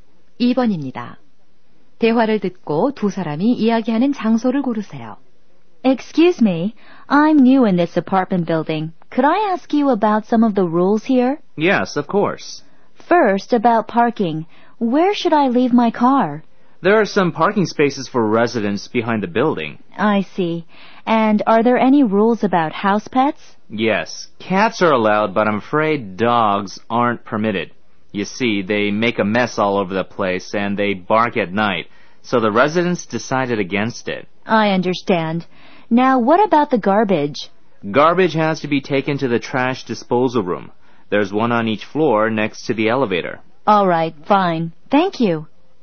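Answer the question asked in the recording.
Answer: 아파트 건물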